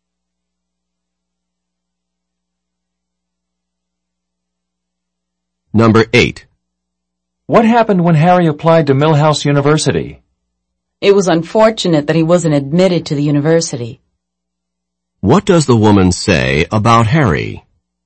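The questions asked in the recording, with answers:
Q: What does the woman say about Harry?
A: Unfortunately, he was not admitted.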